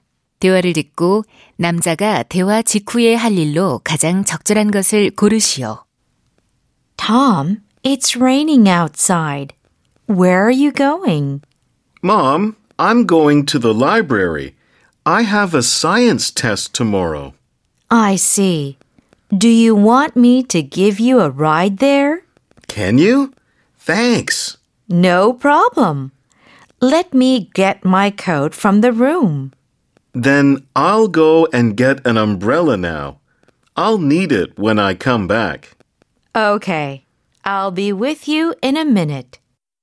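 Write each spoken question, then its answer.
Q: 대화를 듣고 남자가 대화 직후에 할 일로 가장 적절한 것을 고르시오.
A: 우산 가져오기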